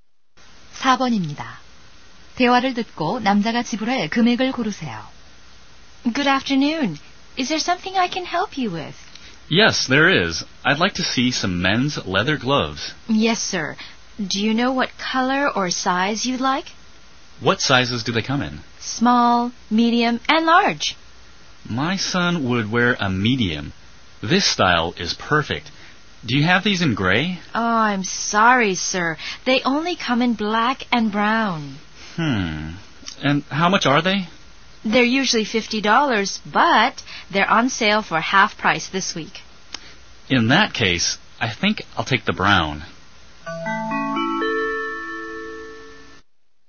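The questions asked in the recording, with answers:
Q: 대화를 듣고 남자가 지불할 금액을 고르세요.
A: 25달러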